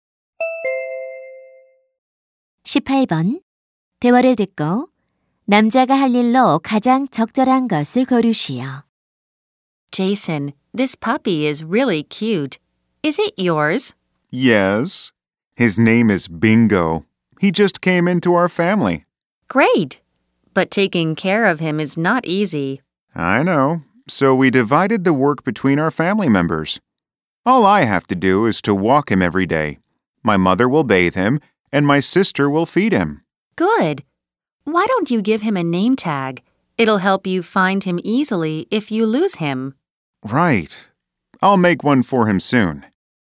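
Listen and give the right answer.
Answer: 강아지 이름표 만들기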